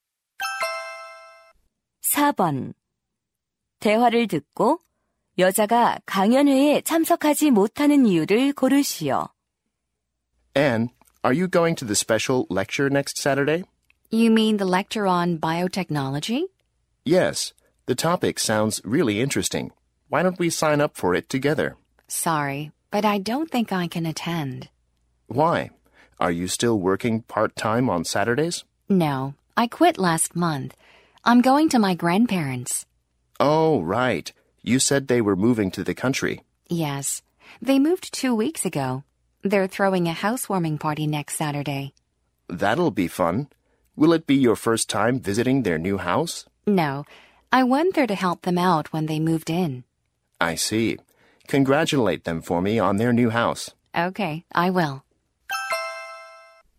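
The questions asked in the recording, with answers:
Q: 대화를 듣고 여자가 강연회에 참석하지 못하는 이유를 고르시오.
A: 조부모님 집들이에 가야 해서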